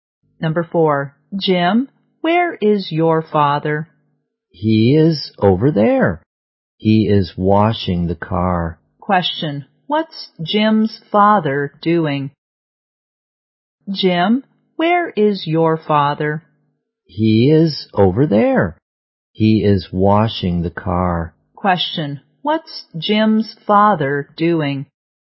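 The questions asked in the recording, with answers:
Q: what's Jim's father doing?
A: Washing the car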